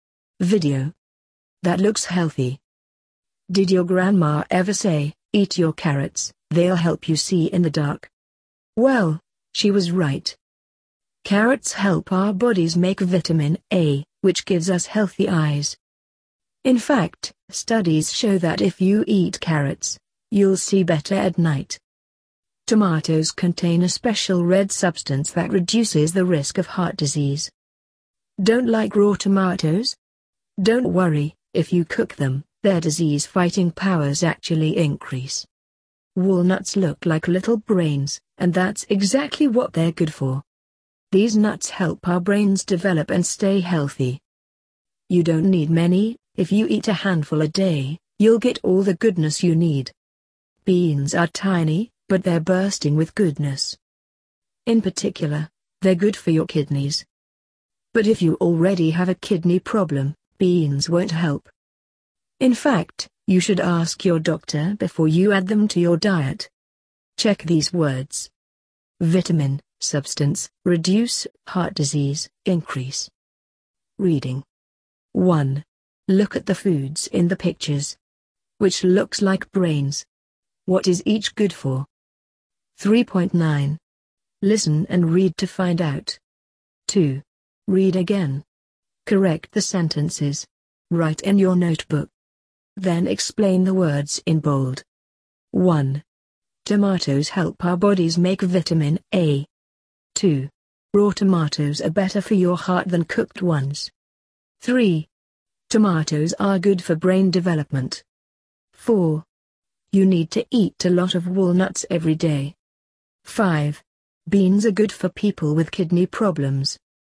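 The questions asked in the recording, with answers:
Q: Tomatoes help our bodies make vitamin A.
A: Carrots help our bodies make vitamin A.

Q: Raw tomatoes are better for your heart than cooked ones.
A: Cooked tomatoes are better; cooking increases their disease-fighting powers.

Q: Tomatoes are good for brain development.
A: Walnuts are good for brain development.

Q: You need to eat a lot of walnuts every day.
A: You only need a handful a day.

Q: Beans are good for people with kidney problems.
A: Beans won't help people who already have kidney problems.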